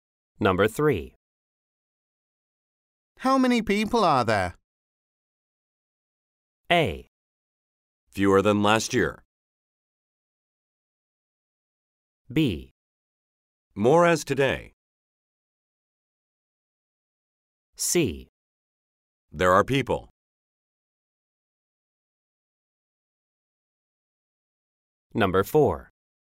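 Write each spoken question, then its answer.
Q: How many people are there?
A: A: Fewer than last year.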